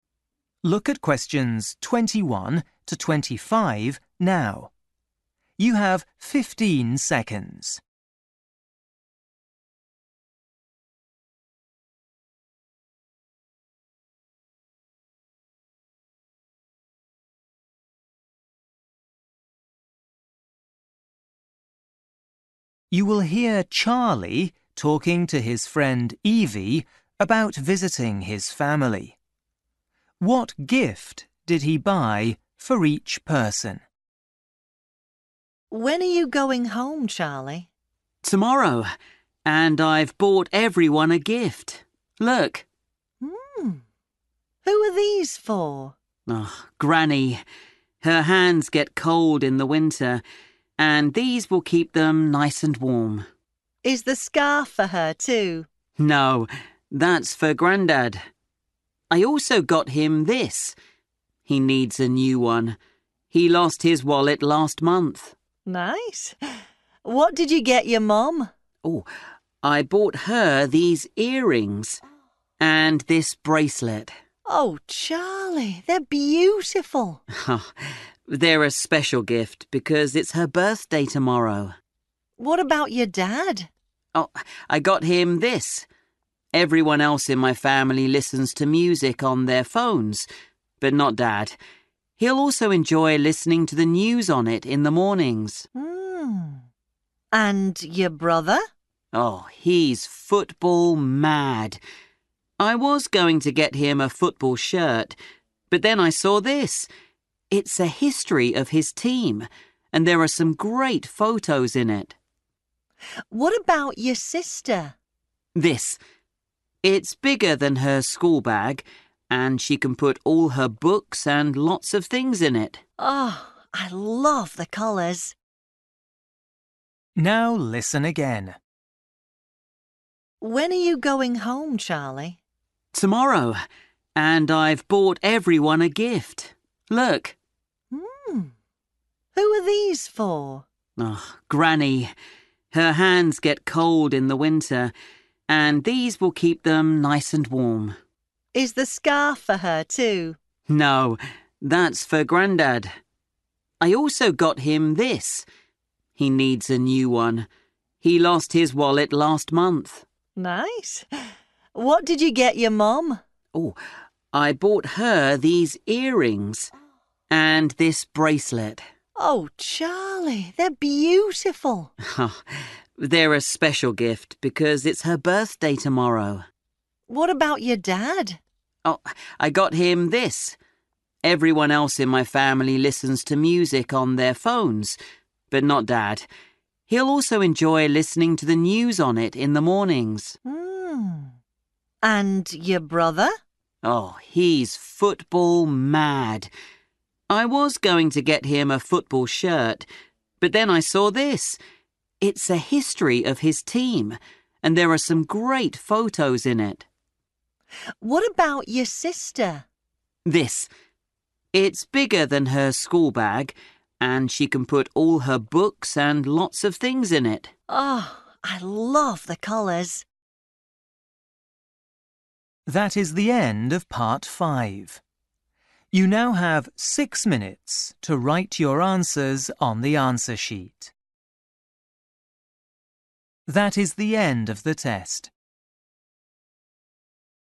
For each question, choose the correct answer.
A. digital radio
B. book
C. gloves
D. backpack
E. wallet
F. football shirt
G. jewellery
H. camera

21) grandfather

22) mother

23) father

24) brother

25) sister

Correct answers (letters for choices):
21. E
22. G
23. A
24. B
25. D

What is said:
Evie: When are you going home, Charlie?
Charlie: Tomorrow, and I've bought everyone a gift. Look!
Evie: Who are these for?
Charlie: Granny. Her hands get cold in the winter, and these will keep them nice and warm.
Evie: Is the scarf for her, too?
Charlie: No, that's for Grandad. I also got him this – he needs a new one. He lost his wallet last month.
Evie: Nice ... What did you get your mum?
Charlie: I bought her these earrings ... and this bracelet.
Evie: Oh, Charlie, they're beautiful!
Charlie: They're a special gift because it's her birthday tomorrow.
Evie: What about your dad?
Everyone else in my family listens to music on their phones, but not Dad. He'll also enjoy listening to the news on it in the mornings.
Evie: And your brother?
Charlie: Oh, he's football mad. I was going to get him a football shirt, but then I saw this. It's a history of his team and there are some great photos in it.
It's bigger than her school bag and she can put all her books and lots of things in it.
Evie: I love the colours.
Now listen again.

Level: KET (A2)